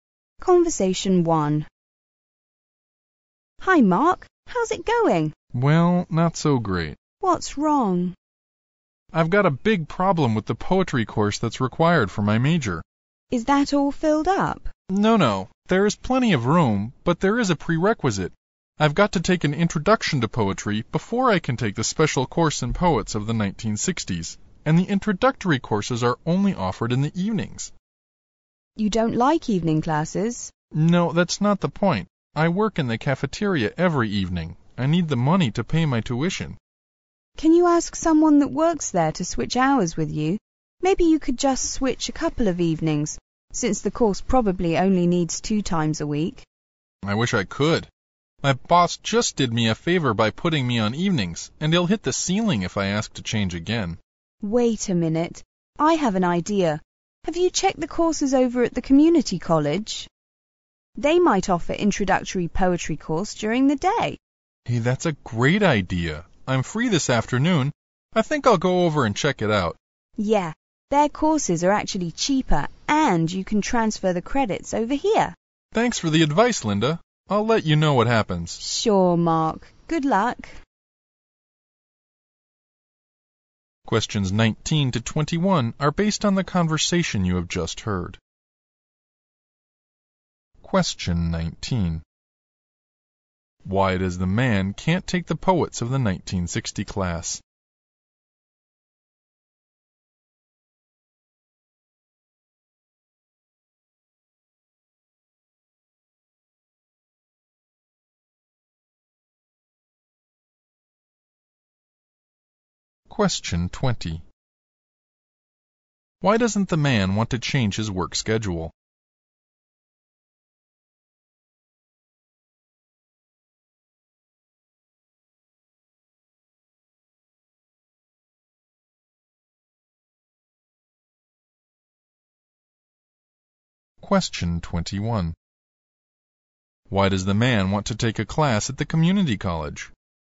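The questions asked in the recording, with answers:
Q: Why does the man can't take the poets of the 1960 class?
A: He hasn't taken the prerequisite introduction to poetry course

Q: Why doesn't the man want to change his work schedule?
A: His boss just did him a favor by putting him on evenings

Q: Why does the man want to take a class at the community college?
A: It may offer the introductory poetry course during the day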